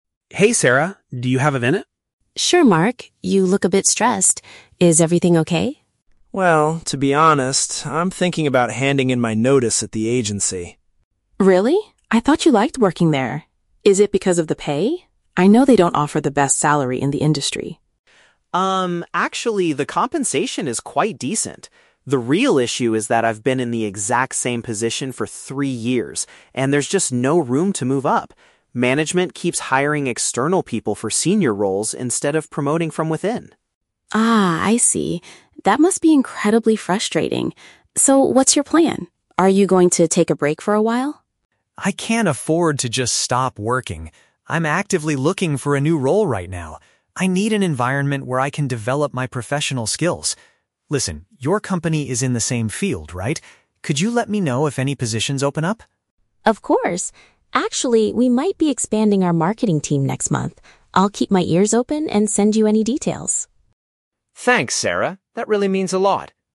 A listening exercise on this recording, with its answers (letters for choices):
Listen to the conversation between two friends and choose the correct answer (A, B, or C) for each question.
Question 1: Why does the man want to leave his current job?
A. He is completely unsatisfied with his income.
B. There are no opportunities for career advancement.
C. He does not get along with the new management team.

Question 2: What does the man intend to do next?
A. Take some time off to relax.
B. Ask his boss for a promotion.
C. Search for a position at a different company.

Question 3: What does the woman promise to do to help the man?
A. Introduce him to her manager immediately.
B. Inform him about potential job vacancies at her workplace.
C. Help him rewrite his resume for the marketing team.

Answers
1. B
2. C
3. B

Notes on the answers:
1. Mark clearly states that there is "no room to move up" and they don't promote from within. This is a paraphrase of "no opportunities for career advancement". Option (A) is The Trap: Sarah mentions "salary" and "pay", but Mark rejects this by saying "the compensation is quite decent". Option (C) is plausible but never mentioned in the audio.
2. Mark says he is "actively looking for a new role". Option (A) is The Trap: Sarah asks if he is going to "take a break for a while" (time off to relax), but Mark explicitly rejects this by saying "I can't afford to just stop working". Option (B) is not mentioned.
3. Mark asks Sarah to let him know if "any positions open up" at her company. Sarah agrees and says she will "keep my ears open and send you any details" (inform him about vacancies). Option (A) and (C) mention things related to job hunting (manager, resume) but she does not promise to do these specific actions.

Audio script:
Mark: Hey, Sarah. Do you have a minute?
Sarah: Sure, Mark. You look a bit stressed. Is everything okay?
Mark: Well, to be honest, I'm thinking about handing in my notice at the agency.
Sarah: Really? I thought you liked working there. Is it because of the pay? I know they don't offer the best salary in the industry.
Mark: Um, actually, the compensation is quite decent. The real issue is that I've been in the exact same position for three years, and there's just no room to move up. Management keeps hiring external people for senior roles instead of promoting from within.
Sarah: Ah, I see. That must be incredibly frustrating. So, what's your plan? Are you going to take a break for a while?
Mark: I can't afford to just stop working. I'm actively looking for a new role right now. I need an environment where I can develop my professional skills. Listen, your company is in the same field, right? Could you let me know if any positions open up?
Sarah: Of course! Actually, we might be expanding our marketing team next month. I'll keep my ears open and send you any details.